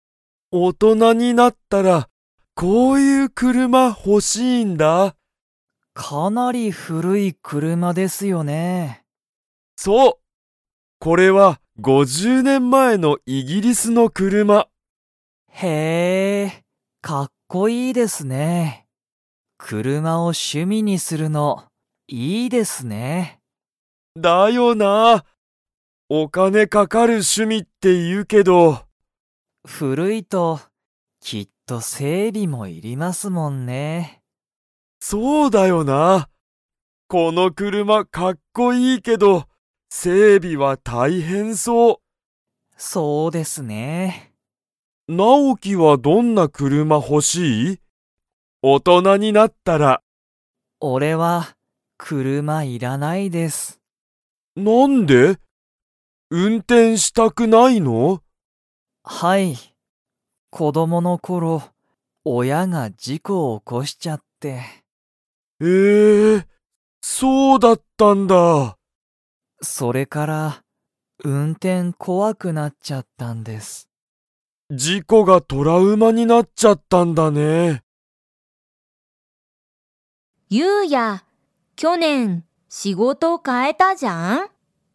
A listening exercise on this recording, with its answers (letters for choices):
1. ヒロトは、大人おとなになったら の車くるまが欲ほしい。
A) 新あたらしい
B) 古ふるい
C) 安やすい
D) 高たかい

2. ナオキは大人おとなになったら運転うんてんしたいですか?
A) はい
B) いいえ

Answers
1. B
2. B

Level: Level 4